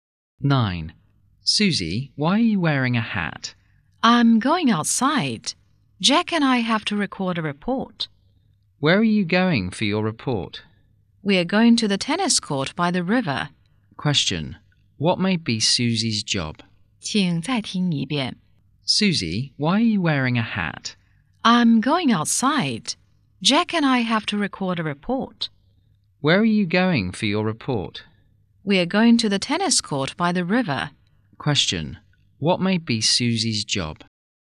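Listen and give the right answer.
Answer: A reporter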